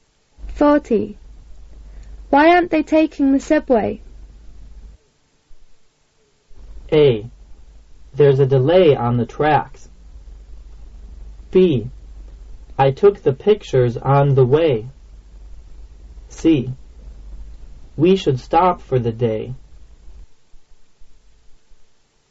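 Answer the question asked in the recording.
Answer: A: There's a delay on the tracks.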